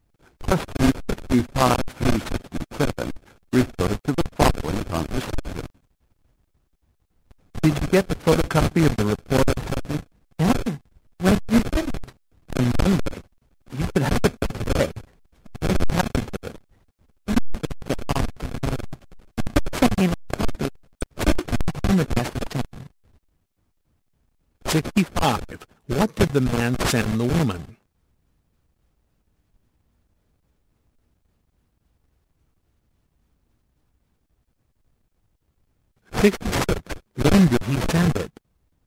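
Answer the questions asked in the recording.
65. A photocopy of the report
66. On Monday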